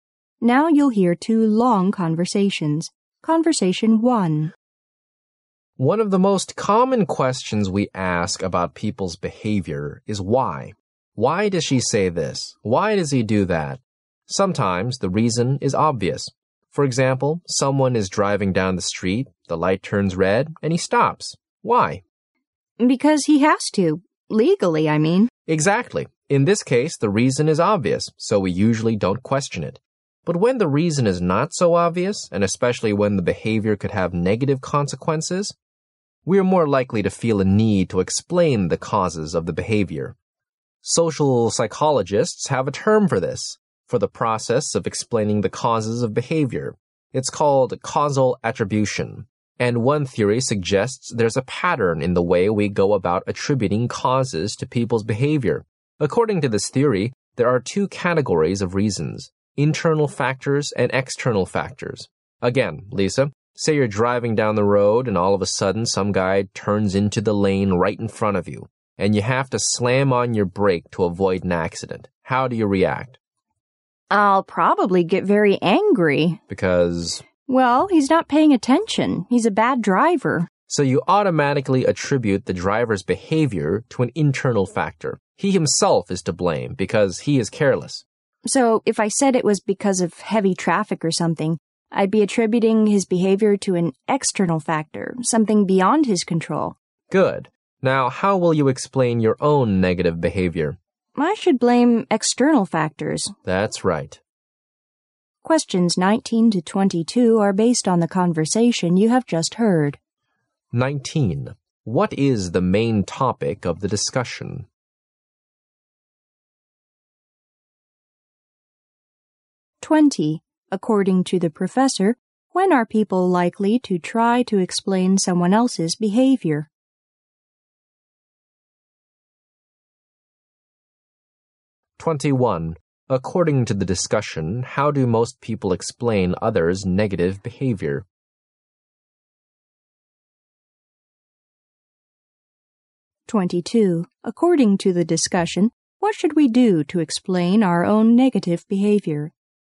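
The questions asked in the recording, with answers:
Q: What is the main topic of the discussion?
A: Causal attribution: how people explain the causes of behavior

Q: According to the professor, when are people likely to try to explain someone else's behavior?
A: When the reason is not obvious and the behavior could have negative consequences

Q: According to the discussion, how do most people explain others' negative behavior?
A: By attributing it to internal factors

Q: According to the discussion, what should we do to explain our own negative behavior?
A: Blame external factors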